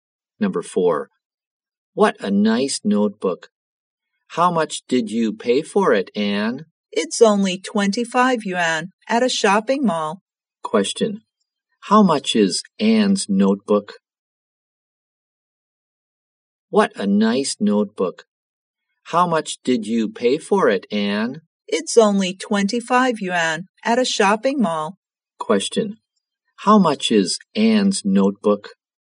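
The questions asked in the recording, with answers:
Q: how much is Anne's notebook?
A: 25 yuan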